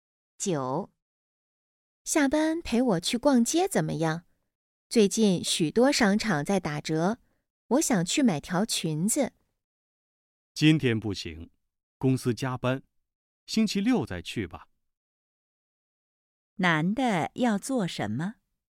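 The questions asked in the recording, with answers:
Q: 男的要做什么?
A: 加班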